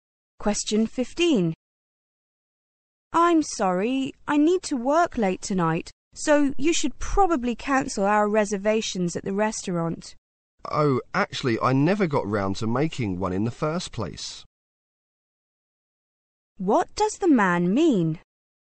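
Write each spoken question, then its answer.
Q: What does the man mean?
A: He never made the reservation, so there is nothing to cancel.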